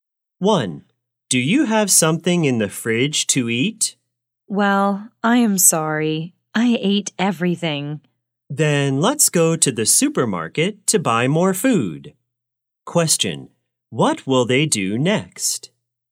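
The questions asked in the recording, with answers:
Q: what will they do next?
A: Go to the supermarket to buy more food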